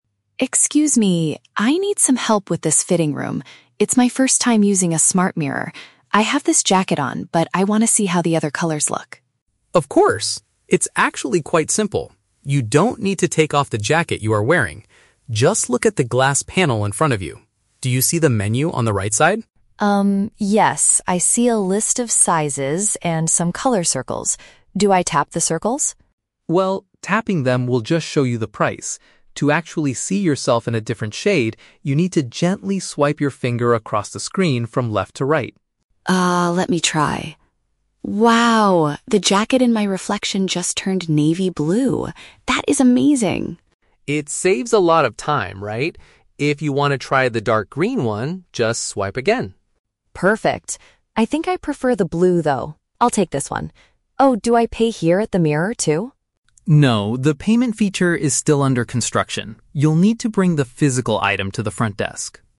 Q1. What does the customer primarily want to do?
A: View a piece of clothing in different shades.

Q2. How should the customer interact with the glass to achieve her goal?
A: By moving her finger sideways across the display.

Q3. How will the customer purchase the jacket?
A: She must go to the main counter to pay for it.

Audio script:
Customer: Excuse me, I need some help with this fitting room. It's my first time using a smart mirror. I have this jacket on, but I want to see how the other colors look.
Assistant: Of course! It's actually quite simple. You don't need to take off the jacket you are wearing. Just look at the glass panel in front of you. Do you see the menu on the right side?
Customer: Um, yes, I see a list of sizes and some color circles. Do I tap the circles?
Assistant: Well, tapping them will just show you the price. To actually see yourself in a different shade, you need to gently swipe your finger across the screen from left to right.
Customer: Ah, let me try. Wow! The jacket in my reflection just turned navy blue. That is amazing.
Assistant: It saves a lot of time, right? If you want to try the dark green one, just swipe again.
Customer: Perfect. I think I prefer the blue, though. I'll take this one. Oh, do I pay here at the mirror, too?
Assistant: No, the payment feature is still under construction. You'll need to bring the physical item to the front desk.